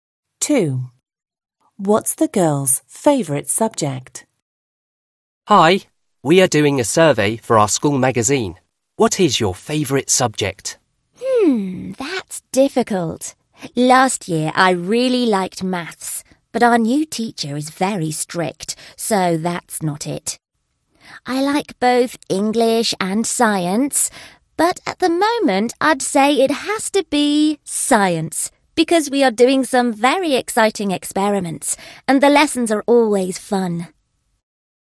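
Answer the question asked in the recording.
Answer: Science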